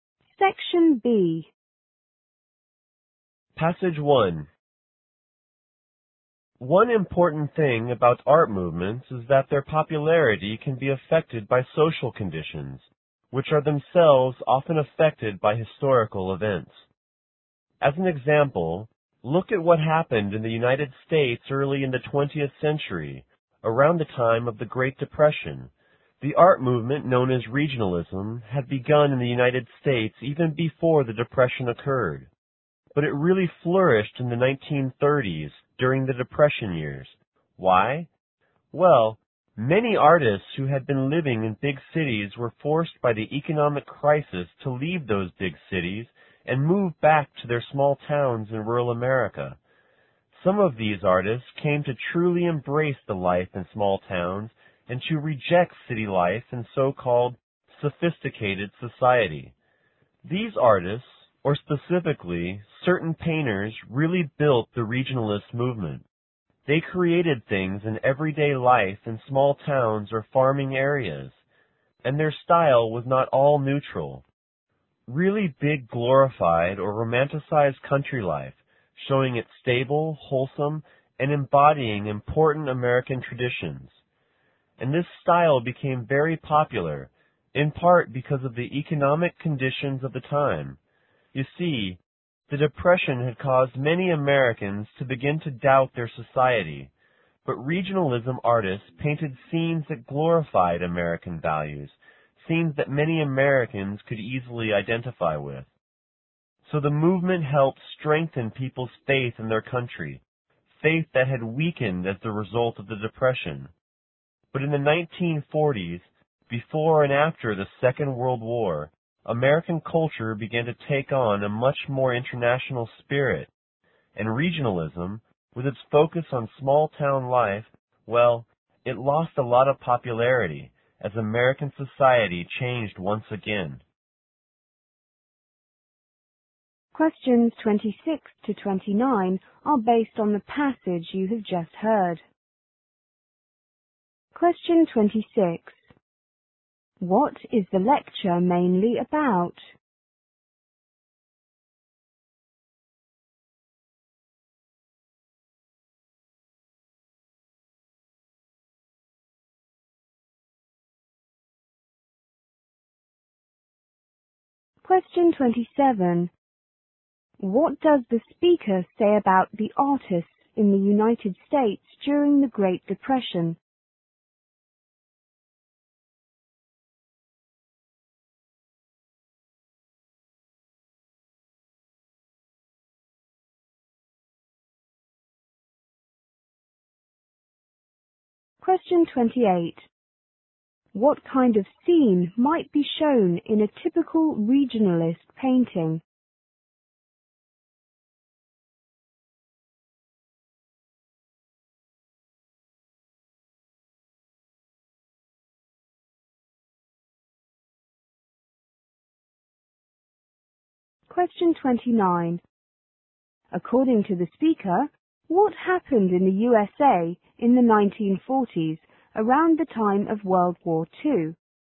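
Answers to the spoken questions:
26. How social conditions affected the popularity of regionalism
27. Many left big cities and moved back to small towns
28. Everyday life in a small town or farm area
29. Culture became more international and regionalism lost popularity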